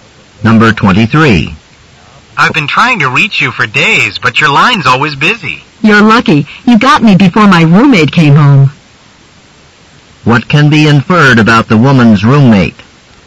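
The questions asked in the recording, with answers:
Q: What can be inferred about the woman's roommate?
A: She uses the phone a lot.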